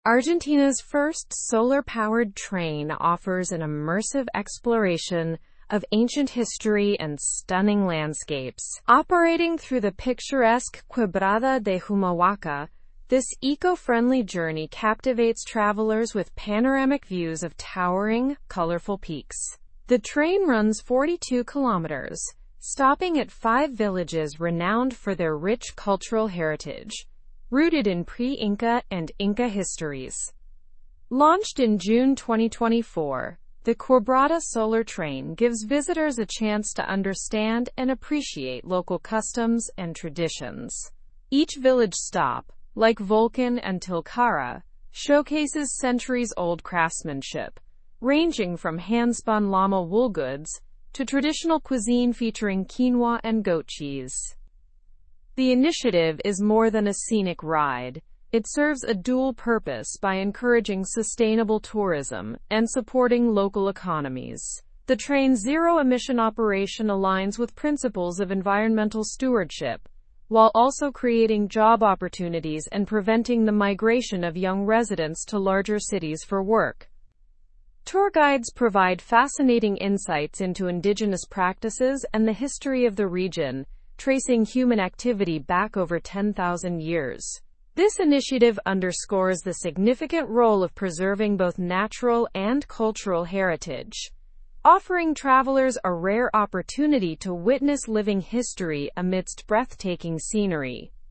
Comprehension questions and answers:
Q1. What does the solar train in Argentina offer to its travelers?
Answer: It offers an immersive exploration of ancient history and stunning landscapes.

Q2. Through which region does the train operate?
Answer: It operates through the picturesque Quebrada de Humahuaca.

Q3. How many kilometers does the train run?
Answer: The train runs 42 kilometers.

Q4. What is one cultural activity tourists can experience at village stops?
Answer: Tourists can experience craftsmanship, like hand-spun llama wool goods.

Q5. What are two benefits of this train initiative?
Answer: The train supports sustainable tourism and local economies.

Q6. When was the Quebrada Solar Train launched?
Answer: It was launched in June

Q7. What do tour guides provide during the journey?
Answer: Tour guides provide insights into indigenous practices and history.

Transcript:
Argentina's first solar-powered train offers an immersive exploration of ancient history and stunning landscapes. Operating through the picturesque Quebrada de Humahuaca, this eco-friendly journey captivates travelers with panoramic views of towering, colorful peaks. The train runs 42 kilometers, stopping at five villages renowned for their rich cultural heritage, rooted in pre-Inca and Inca histories.
Launched in June 2024, the Quebrada Solar Train gives visitors a chance to understand and appreciate local customs and traditions. Each village stop, like Volcán and Tilcara, showcases centuries-old craftsmanship, ranging from hand-spun llama wool goods to traditional cuisine featuring quinoa and goat cheese.
The initiative is more than a scenic ride; it serves a dual purpose by encouraging sustainable tourism and supporting local economies. The train's zero-emission operation aligns with principles of environmental stewardship, while also creating job opportunities and preventing the migration of young residents to larger cities for work.
Tour guides provide fascinating insights into indigenous practices and the history of the region, tracing human activity back over 10,000 years. This initiative underscores the significant role of preserving both natural and cultural heritage, offering travelers a rare opportunity to witness living history amidst breathtaking scenery.

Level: (Level 3)